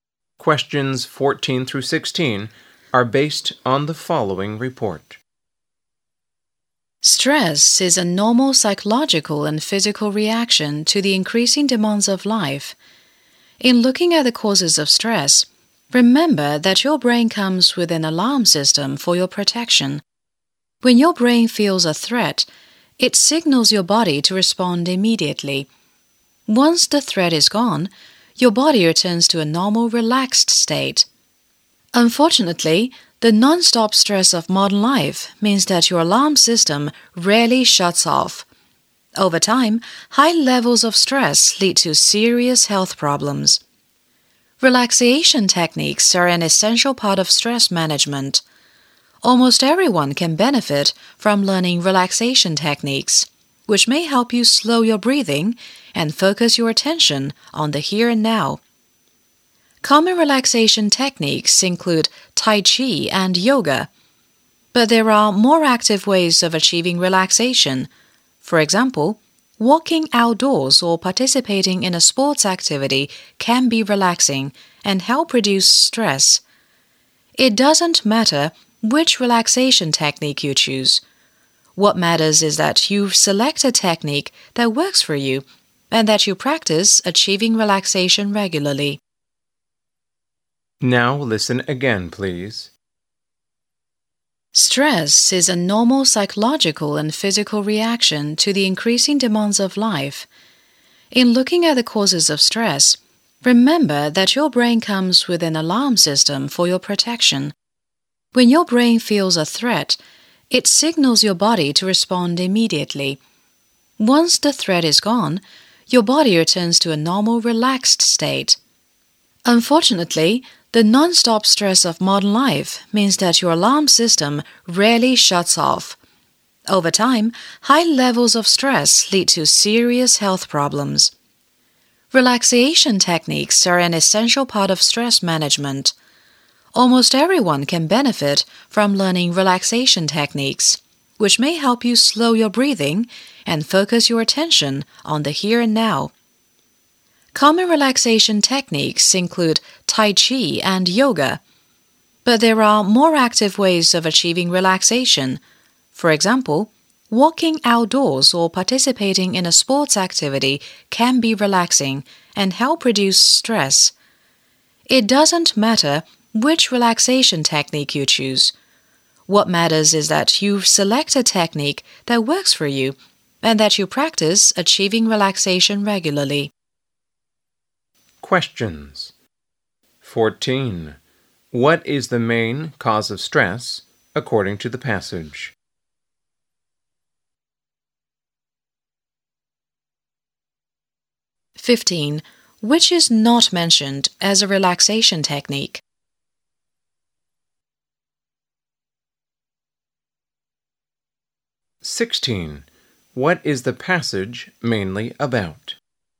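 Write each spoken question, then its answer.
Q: What is the passage mainly about?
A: Relaxation techniques for managing stress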